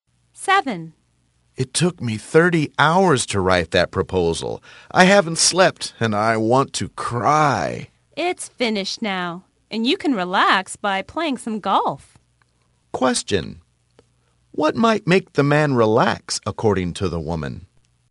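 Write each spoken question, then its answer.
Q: What might make the man relax, according to the woman?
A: Playing some golf.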